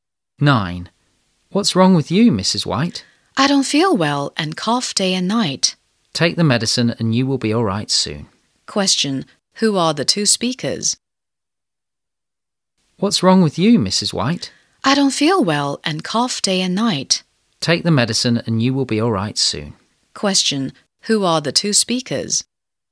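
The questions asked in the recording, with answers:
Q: Who are the two speakers?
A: A doctor and a patient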